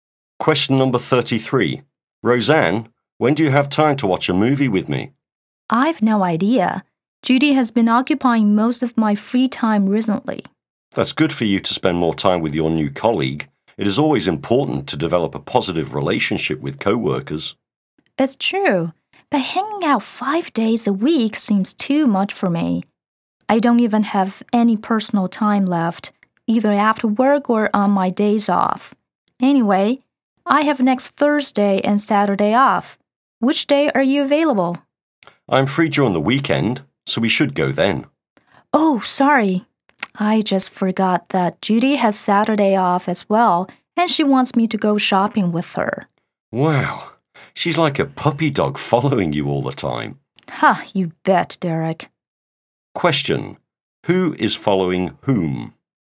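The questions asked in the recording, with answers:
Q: Who is following whom?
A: Judy is following Roseanne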